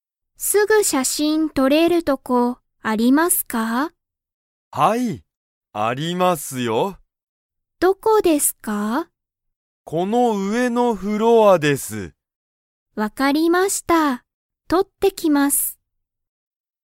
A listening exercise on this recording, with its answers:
写真(しゃしん)はどこで撮(と)れますか?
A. このフロア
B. 上(うえ)のフロア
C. 下(した)のフロア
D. お店(みせ)のフロア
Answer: B. 上(うえ)のフロア

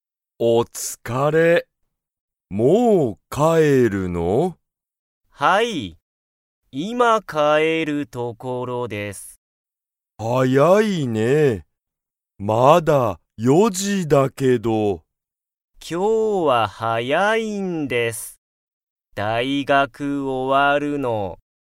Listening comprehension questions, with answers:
タケシは今(いま)____ところだ。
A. 帰(かえ)る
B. 勉強(べんきょう)する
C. 大学(だいがく)に行(い)く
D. 歩(ある)く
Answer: A. 帰(かえ)る

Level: Level 1

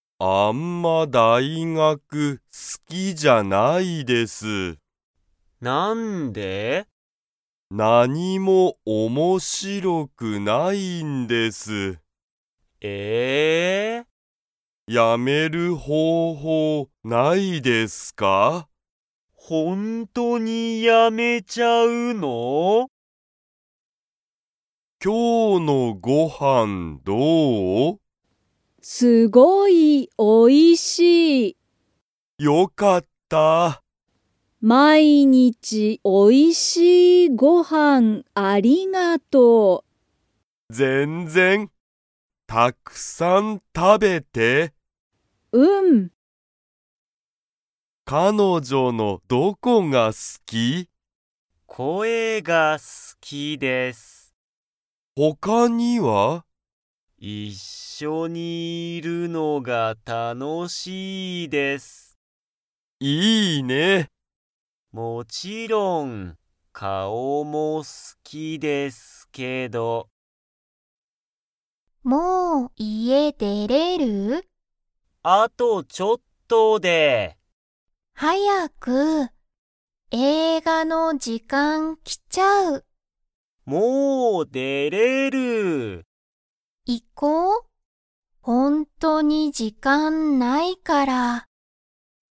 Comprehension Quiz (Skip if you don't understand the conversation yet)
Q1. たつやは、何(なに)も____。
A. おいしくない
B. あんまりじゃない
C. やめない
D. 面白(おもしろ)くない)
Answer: D. 面白(おもしろ)くない)

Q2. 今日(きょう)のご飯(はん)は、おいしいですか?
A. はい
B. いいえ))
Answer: A. はい

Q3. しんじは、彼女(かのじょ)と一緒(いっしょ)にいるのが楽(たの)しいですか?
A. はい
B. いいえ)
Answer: A. はい

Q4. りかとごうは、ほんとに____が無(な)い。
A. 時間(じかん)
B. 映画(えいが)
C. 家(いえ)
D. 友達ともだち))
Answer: A. 時間(じかん)

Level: Level 1

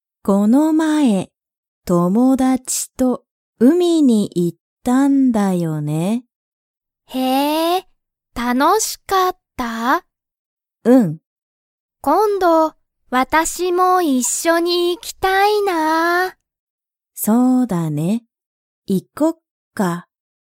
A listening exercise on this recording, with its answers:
Comprehension Quiz (Skip if you don't understand the conversation yet)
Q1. 姉あねは、友達ともだちと海うみに行いきましたか?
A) はい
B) いいえ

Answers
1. A) はい

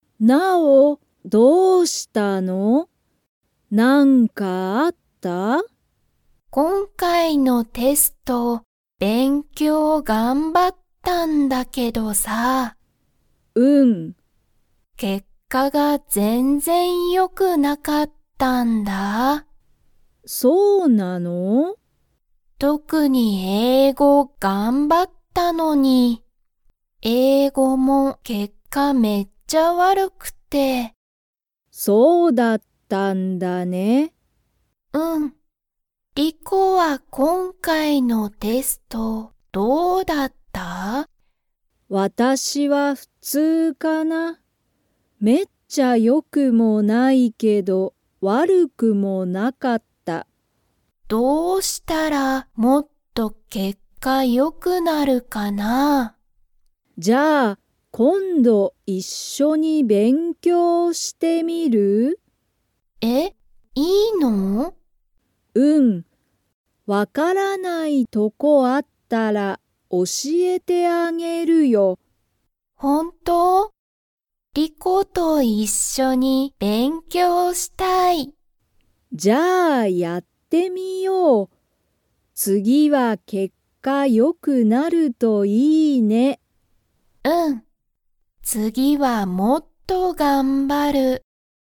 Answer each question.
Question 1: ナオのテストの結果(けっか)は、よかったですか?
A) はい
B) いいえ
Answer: B) いいえ

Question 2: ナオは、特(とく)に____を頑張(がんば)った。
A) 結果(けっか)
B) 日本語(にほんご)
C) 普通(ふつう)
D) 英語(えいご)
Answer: D) 英語(えいご)

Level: Level 2

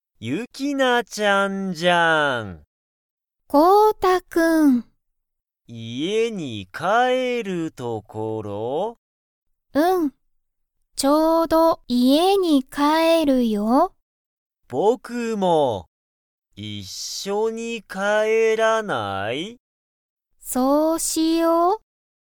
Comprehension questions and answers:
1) ユキナちゃんは、家(いえ)に帰(かえ)る所(ところ)ですか?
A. はい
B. いいえ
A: A. はい

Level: Level 1

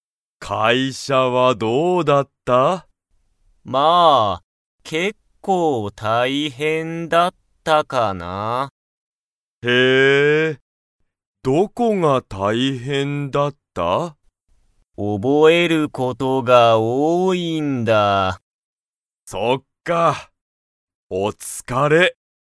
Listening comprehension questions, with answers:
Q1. 会社(かいしゃ)は、____事(こと)が多(おお)い。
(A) 読よむ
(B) 覚(おぼ)える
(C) 食(た)べる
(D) 話(はな)す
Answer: (B) 覚(おぼ)える

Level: Level 1

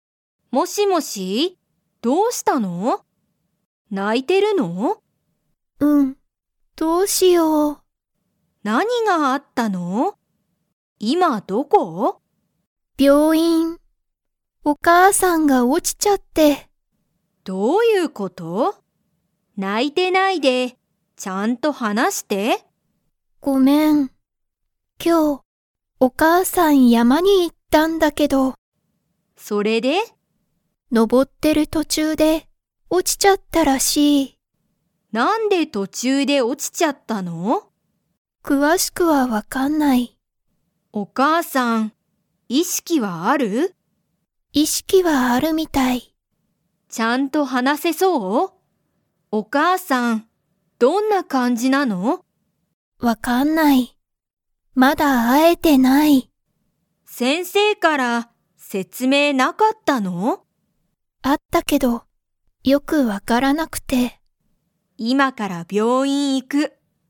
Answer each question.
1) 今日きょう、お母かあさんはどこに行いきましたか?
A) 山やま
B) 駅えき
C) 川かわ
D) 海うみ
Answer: A) 山やま

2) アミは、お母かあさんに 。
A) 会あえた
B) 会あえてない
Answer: B) 会あえてない

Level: Level 3

